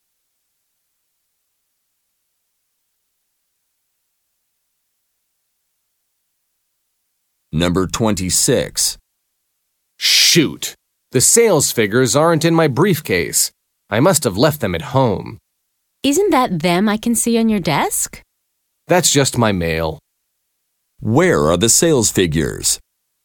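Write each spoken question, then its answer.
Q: Where are the sales figures?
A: At home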